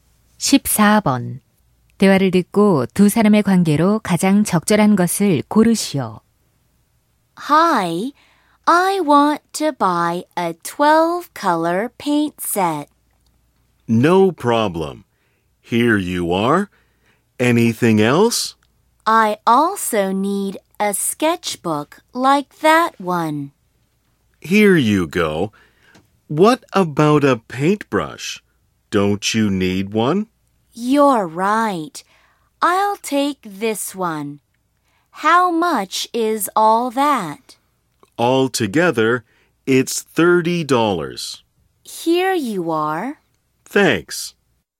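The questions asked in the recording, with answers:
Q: 대화를 듣고 두 사람의 관계로 가장 적절한 것을 고르시오.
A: 손님과 점원 (화방)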